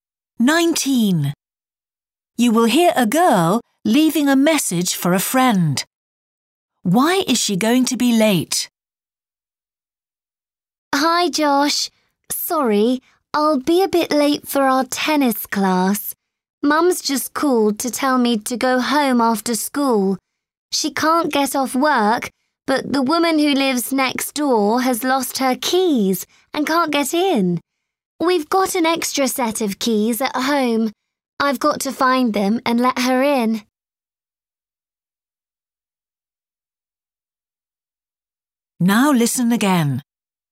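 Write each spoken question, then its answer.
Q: Why is she going to be late?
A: She has to go home to find keys and let her neighbour in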